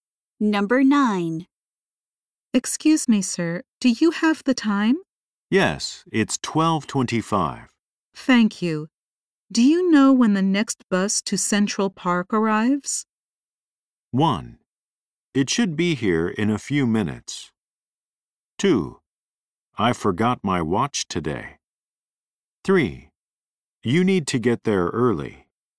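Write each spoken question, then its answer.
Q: Do you know when the next bus to Central Park arrives?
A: 1: It should be here in a few minutes.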